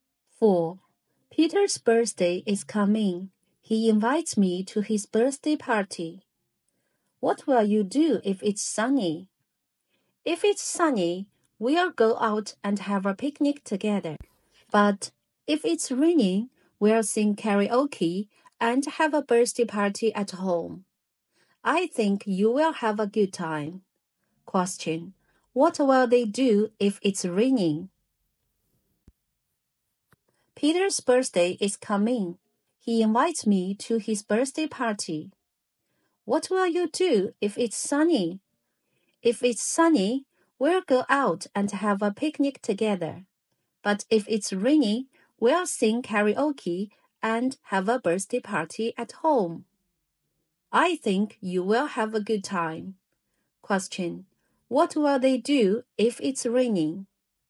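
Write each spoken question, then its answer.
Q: What will they do if it's raining?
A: Sing karaoke and have a birthday party at home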